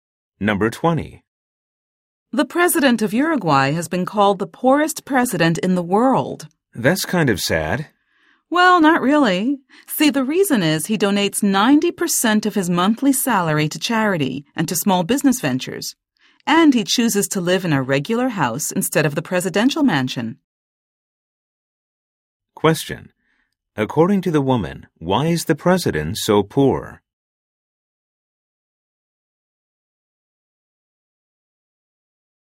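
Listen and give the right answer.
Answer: He donates 90% of his salary to charity and small businesses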